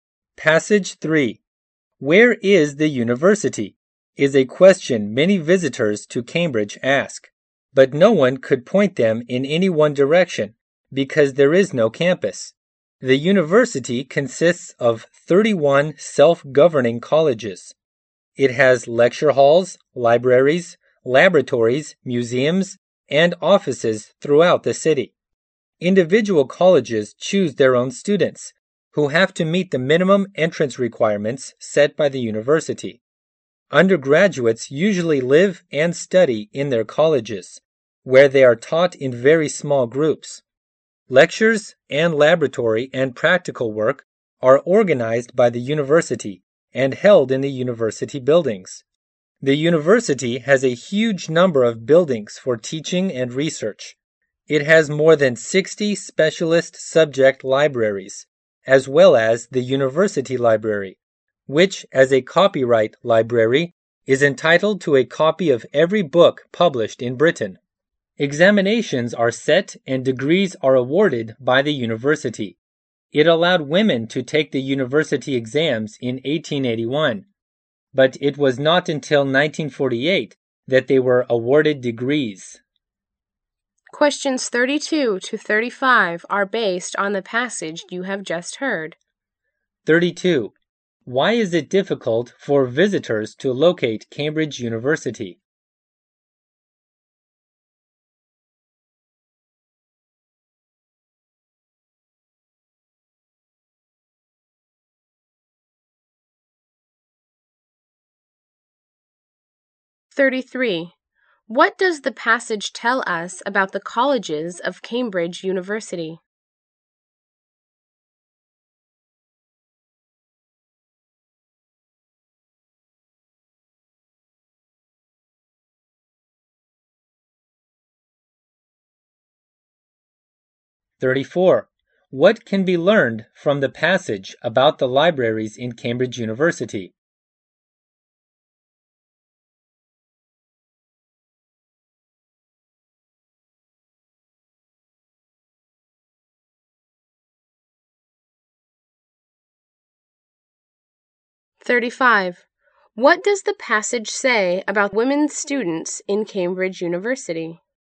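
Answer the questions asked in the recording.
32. It has no campus.
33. They are self-governing and choose their own students.
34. It has more than 60 specialist libraries, and the university library gets a copy of every book published in Britain.
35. They could take exams from 1881 but got degrees only from 1948.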